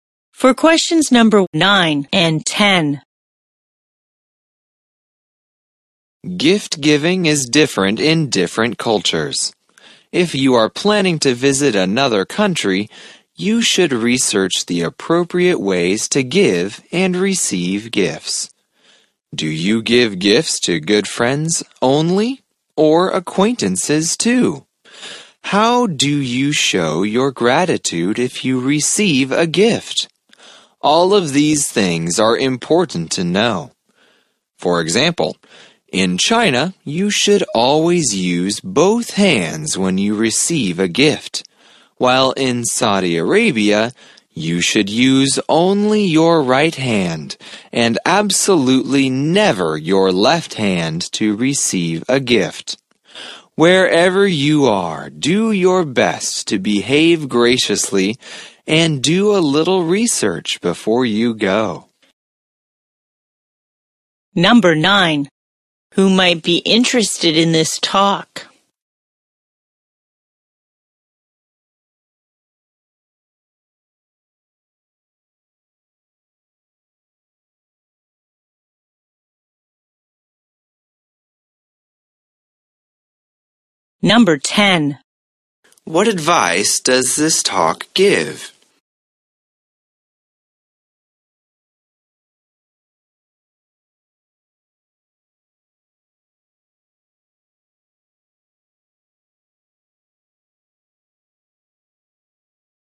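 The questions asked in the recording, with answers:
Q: Who might be interested in this talk?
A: People planning to visit another country

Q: What advice does this talk give?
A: Research the appropriate ways to give and receive gifts before you go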